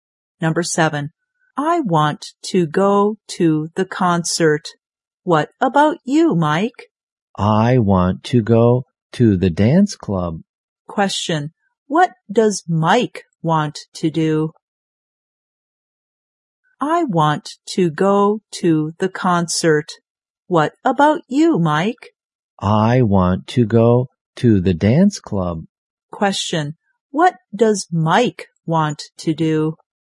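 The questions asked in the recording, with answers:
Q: what does Mike want to do?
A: Go to the dance club.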